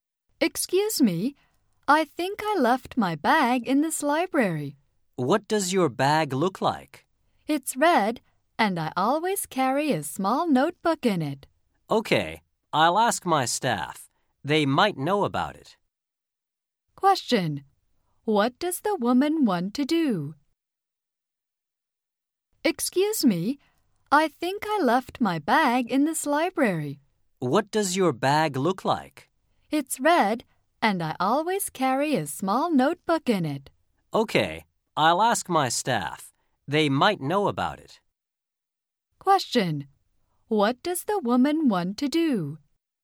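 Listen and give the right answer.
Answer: Find the bag she left in the library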